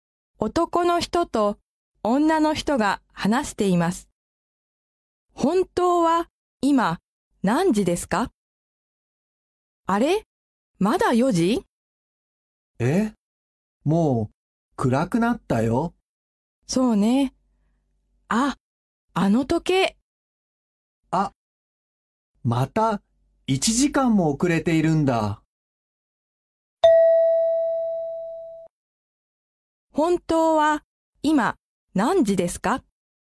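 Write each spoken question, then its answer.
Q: 本当は今何時ですか?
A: 5時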